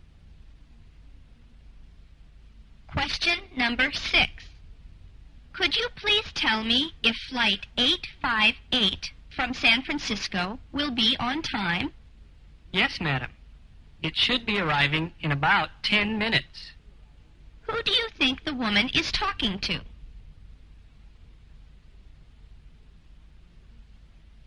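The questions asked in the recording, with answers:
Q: Who do you think the woman is talking to?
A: An airport/airline clerk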